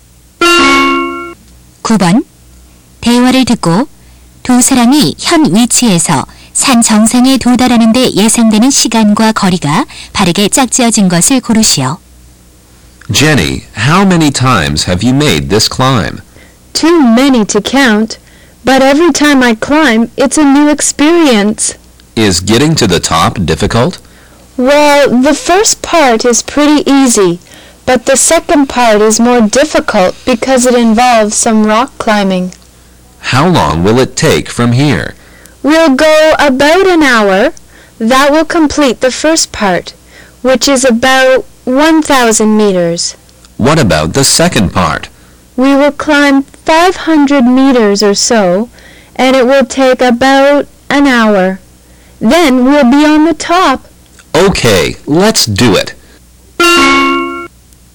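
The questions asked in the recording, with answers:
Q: 대화를 듣고 두 사람이 현 위치에서 산 정상에 도달하는 데 예상되는 시간과 거리가 바르게 짝지어진 것을 고르시오.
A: 약 2시간, 약 1,500미터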